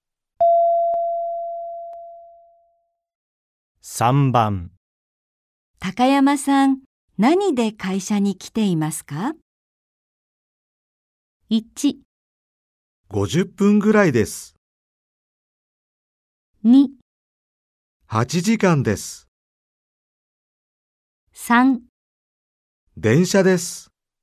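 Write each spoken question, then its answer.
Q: 高山さん、何で会社に来ていますか?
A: 3: 電車です。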